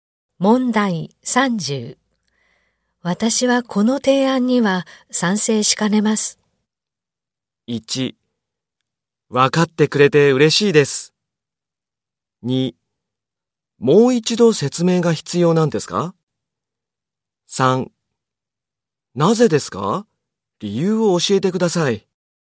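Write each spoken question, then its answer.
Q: 私はこの提案には賛成しかねます。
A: 3: なぜですか?理由を教えてください。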